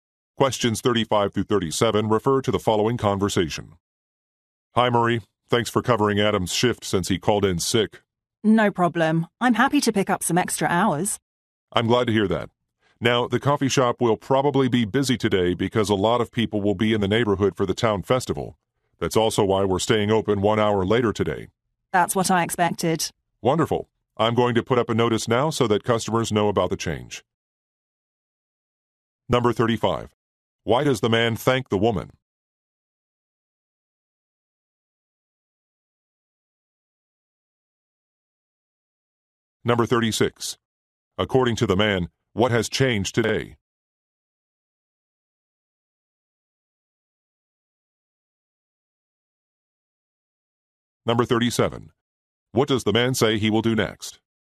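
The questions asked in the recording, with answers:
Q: Why does the man thank the woman?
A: She is covering Adam's shift

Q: According to the man, what has changed today?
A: The shop is staying open 1 hour later

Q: What does the man say he will do next?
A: Put up a notice for customers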